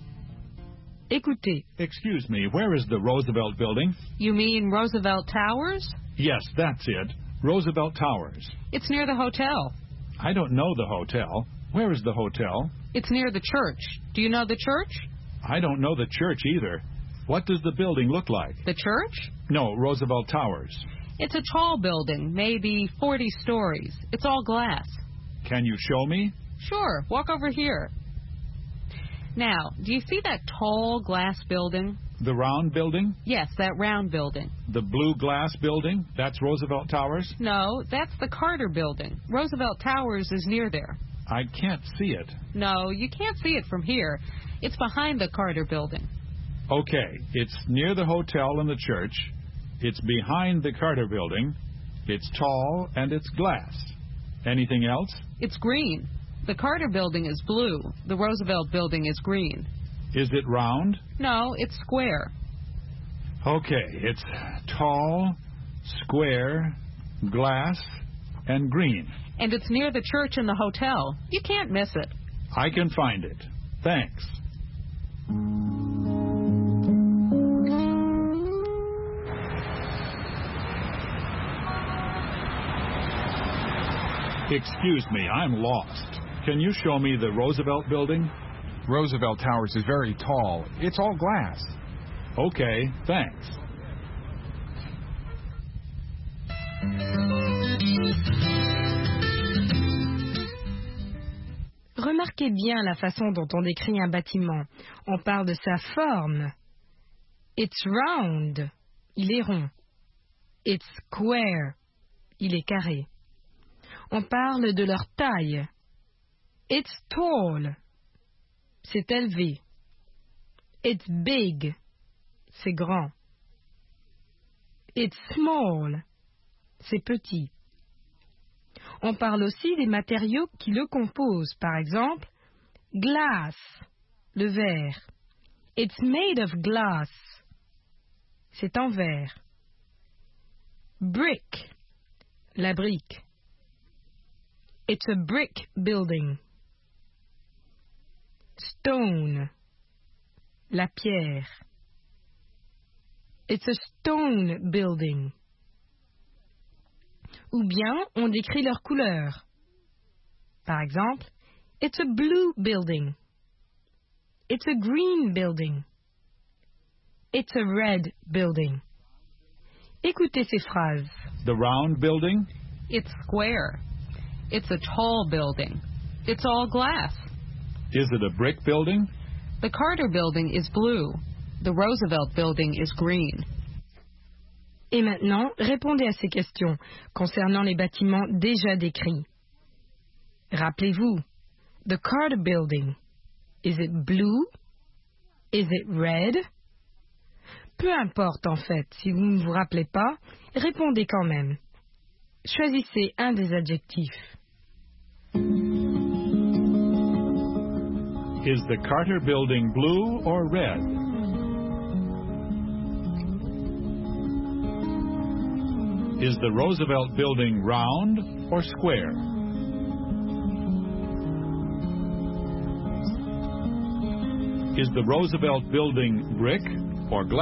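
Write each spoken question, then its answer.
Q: Is the Carter Building blue or red?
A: blue

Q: Is the Roosevelt Building round or square?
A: square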